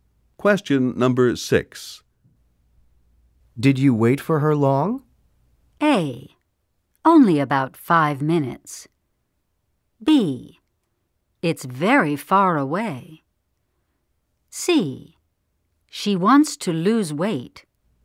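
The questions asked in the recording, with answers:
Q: Did you wait for her long?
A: A: Only about 5 minutes.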